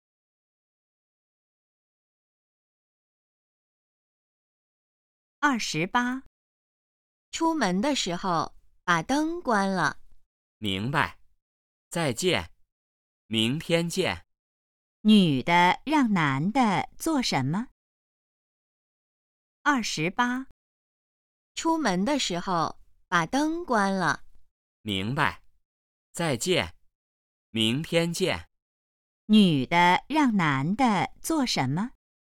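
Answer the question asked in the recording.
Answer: 出门时关灯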